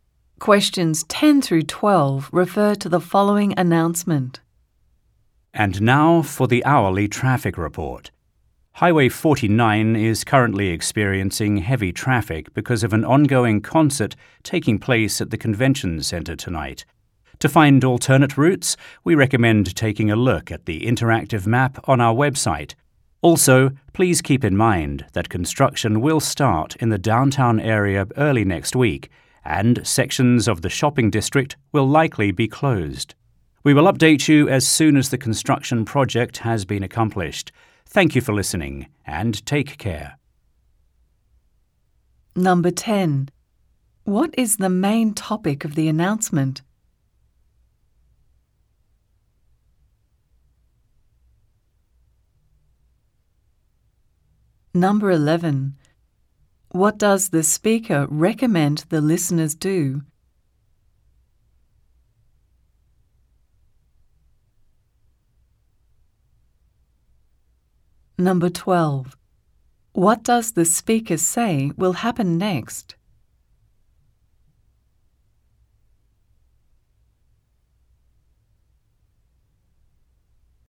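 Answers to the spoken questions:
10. The hourly traffic report (heavy traffic on Highway 49)
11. Look at the interactive map on the website to find alternate routes
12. Construction will start downtown early next week, closing sections of the shopping district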